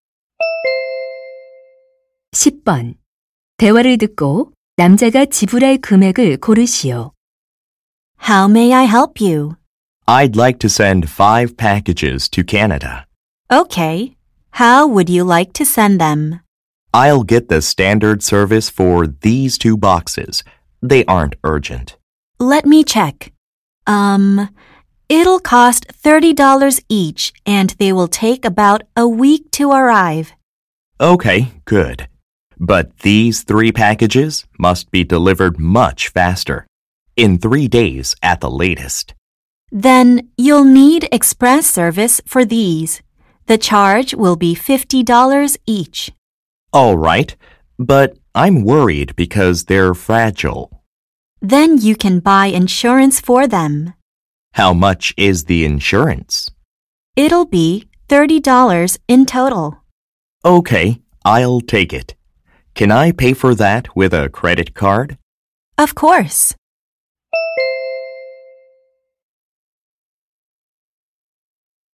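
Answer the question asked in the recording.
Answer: $240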